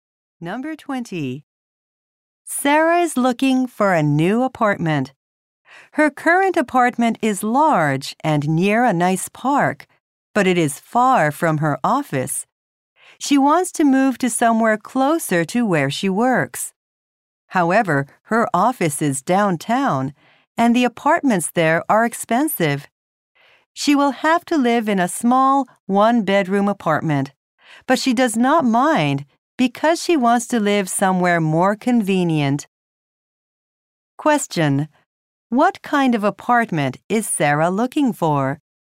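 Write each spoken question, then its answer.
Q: What kind of apartment is Sarah looking for?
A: One close to her office.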